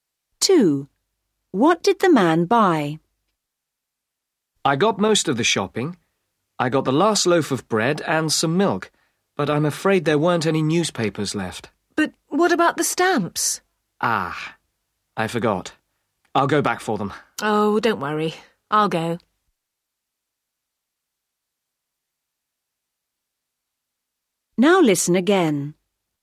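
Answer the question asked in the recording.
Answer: Bread and milk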